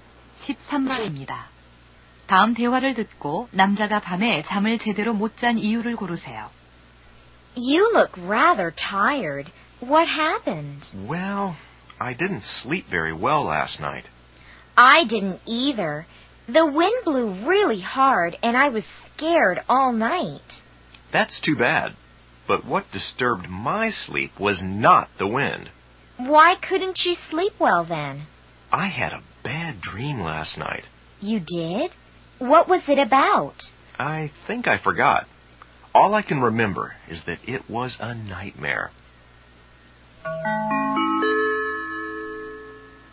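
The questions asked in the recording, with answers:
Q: 다음 대화를 듣고 남자가 밤에 잠을 제대로 못 잔 이유를 고르세요.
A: 악몽을 꿔서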